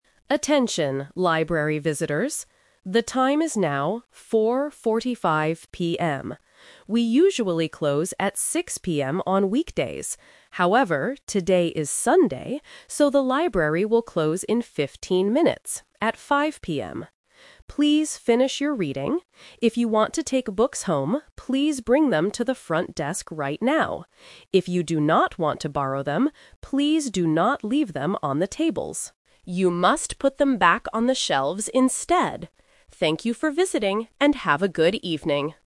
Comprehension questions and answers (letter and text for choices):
Listen to an announcement in a library. Choose the correct answer A, B, or C.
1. What time is the library closing today?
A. At 4:45 PM.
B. At 5:00 PM.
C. At 6:00 PM.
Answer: B. At 5:00 PM.

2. What should you do if you want to take a book home?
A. Bring it to the front desk.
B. Put it on the shelf.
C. Leave it on the table.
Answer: A. Bring it to the front desk.

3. Where should visitors put the books they do NOT want to borrow?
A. At the front desk.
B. On the tables.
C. On the shelves.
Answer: C. On the shelves.

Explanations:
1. The announcer says, "today is Sunday, so the library will close in 15 minutes, at 5:00 PM." Trap: Option A (4:45 PM) is the current time, not the closing time. Option C (6:00 PM) is a trap because it is the "usual" closing time for weekdays, but not for today.
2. Options B and C are instructions for books that visitors do not want to take home.
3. The announcer says, "You must put them back on the shelves instead." Trap: Option B is a tricky trap using negative instruction. The announcer mentions "tables" but says "do not leave them on the tables." Option A is for books people want to borrow.

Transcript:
However, today is Sunday, so the library will close in 15 minutes, at 5:00 PM. Please finish your reading. If you want to take books home, please bring them to the front desk right now. If you do not want to borrow them, please do not leave them on the tables. You must put them back on the shelves instead. Thank you for visiting, and have a good evening.

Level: A2